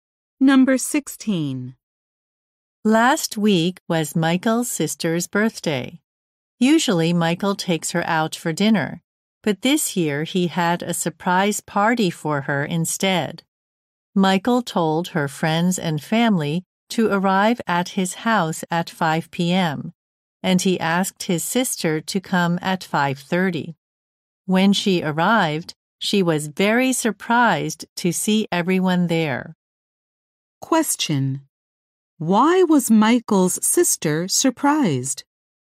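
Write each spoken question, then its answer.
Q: Why was Michael's sister surprised?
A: He had a surprise party with everyone there.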